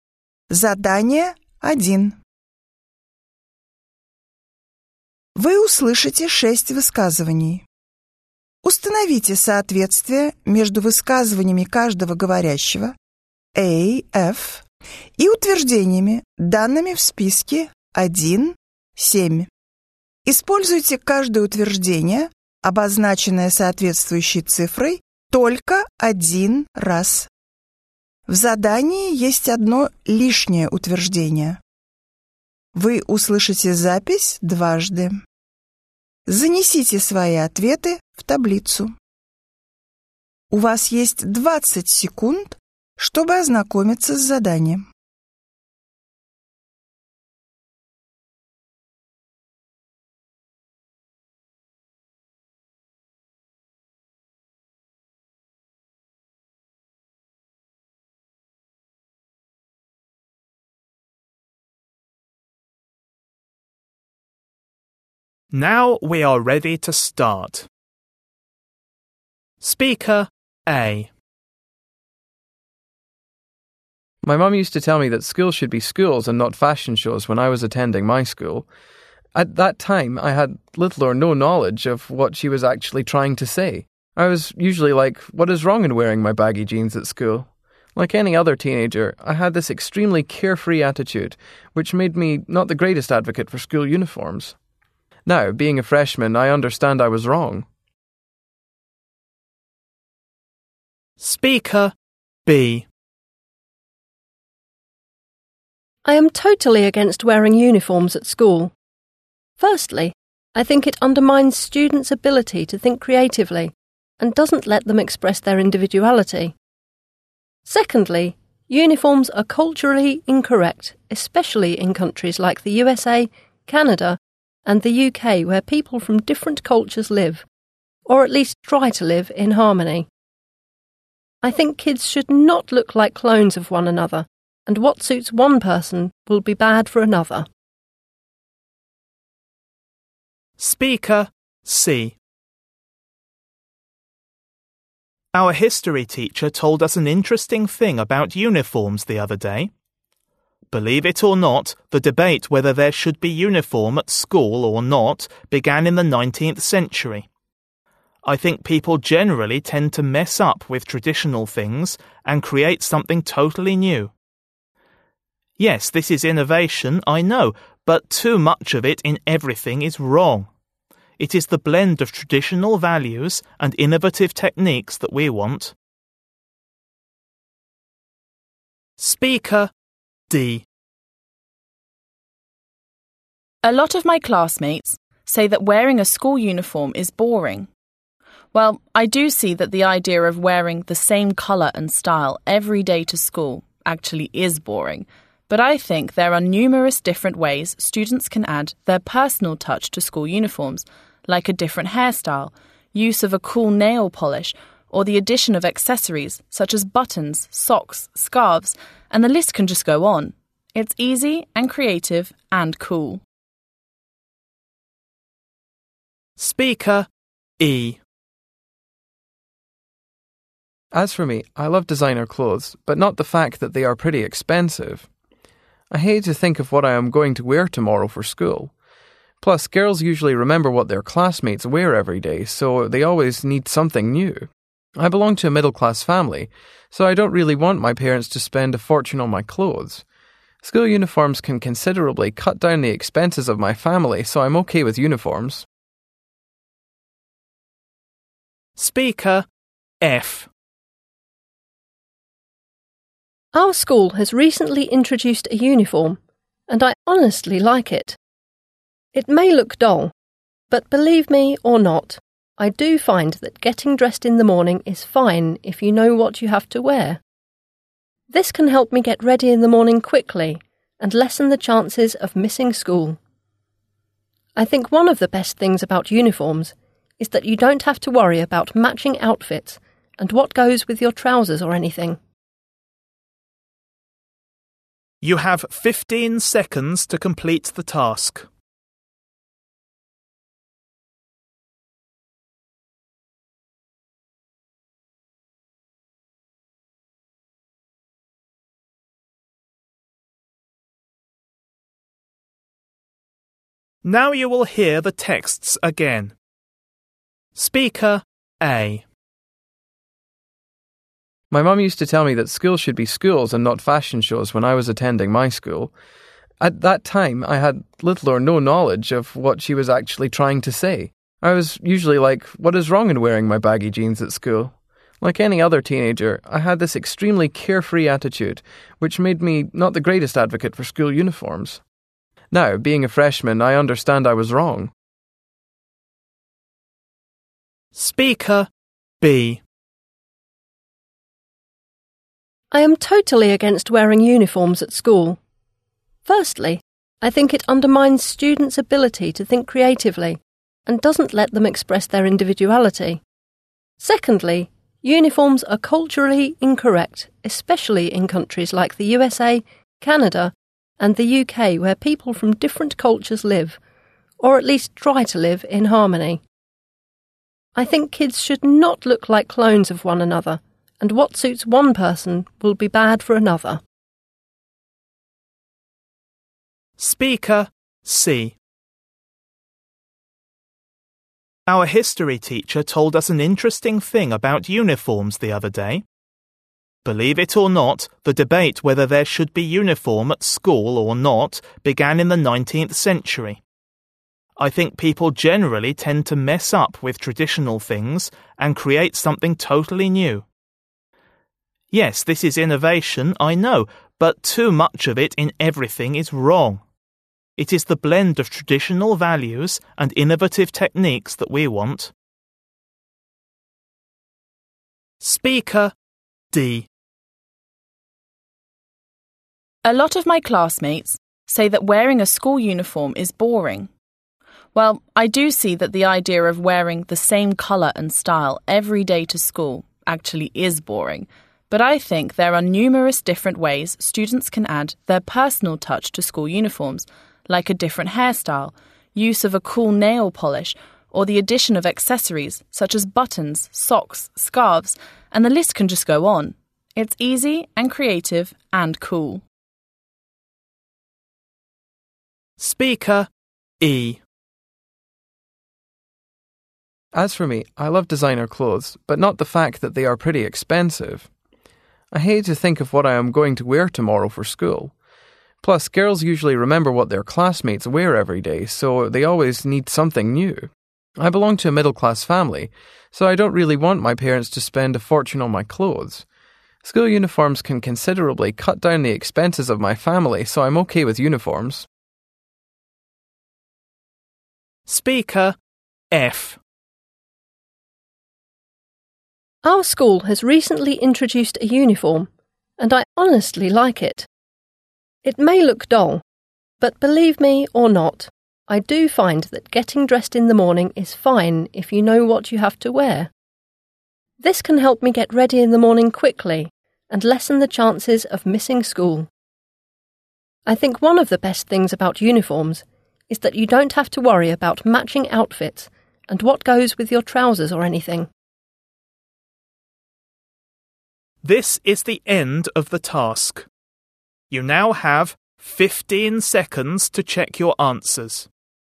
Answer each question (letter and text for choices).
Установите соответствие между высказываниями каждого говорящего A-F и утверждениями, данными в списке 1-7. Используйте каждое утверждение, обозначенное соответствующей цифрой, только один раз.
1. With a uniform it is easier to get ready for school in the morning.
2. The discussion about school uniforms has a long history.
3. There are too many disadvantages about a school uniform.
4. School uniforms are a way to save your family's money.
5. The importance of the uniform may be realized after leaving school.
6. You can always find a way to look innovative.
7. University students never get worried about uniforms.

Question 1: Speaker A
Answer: 5. The importance of the uniform may be realized after leaving school.

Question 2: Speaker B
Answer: 3. There are too many disadvantages about a school uniform.

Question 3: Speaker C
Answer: 2. The discussion about school uniforms has a long history.

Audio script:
My mum used to tell me that school should be schools and not fashion shows when I was attending my school. At that time, I had little or no knowledge of what she was actually trying to say. I was usually like, what is wrong in wearing my baggy jeans at school? Like any other teenager, I had this extremely carefree attitude which made me not the greatest advocate for school uniforms. Now, being a freshman, I understand I was wrong. - Утверждение 5 (The importance of the uniform may be realized after leaving school.
I am totally against wearing uniforms at school. Firstly, I think it undermines students' ability to think creatively and doesn't let them express their individuality. Secondly, uniforms are culturally incorrect, especially in countries like the USA, Canada and the UK where people from different cultures live, or at least try to live in harmony. I think kids should not look like clones of one another, and what suits one person will be bad for another. - Утверждение 3 (There are too many disadvantages about a school uniform.
Our history teacher told us an interesting thing about uniforms the other day. Believe it or not, the debate whether there should be uniform at school or not began in the 19th century. I think people generally tend to mess up with traditional things and create something totally new. Yes, this is innovation, I know, but too much of it in everything is wrong. It is the blend of traditional values and innovative techniques that we want. - Утверждение 2 (The discussion about school uniforms has a long history.
A lot of my classmates say that wearing a school uniform is boring. Well, I do see that the idea of wearing the same colour and style every day to school actually is boring. But I think there are numerous different ways students can add their personal touch to school uniforms, like a different hairstyle, use of a cool nail polish, or the addition of accessories such as buttons, socks, scarves, and the list can just go on. or the addition of accessories such as buttons, socks, scarves and the list can just go on.»
Speaker E
As for me, I love designer clothes, but not the fact that they are pretty expensive. I hate to think of what I am going to wear tomorrow for school. Plus, girls usually remember what their classmates wear every day, so they always need something new. I belong to a middle-class family, so I don't really want my parents to spend a fortune on my clothes. School uniforms can considerably cut down the expenses of my family, so I'm okay with uniforms.
Our school has recently introduced a uniform, and I honestly like it. It may look dull, but believe me or not, I do find that getting dressed in the morning is fine if you know what you have to wear. This can help me get ready in the morning quickly and lessen the chances of missing school. I think one of the best things about uniforms is that you don't have to worry about matching outfits and what goes with your trousers or anything. - Утверждение 1 (With a uniform it is easier to get ready for school in the morning.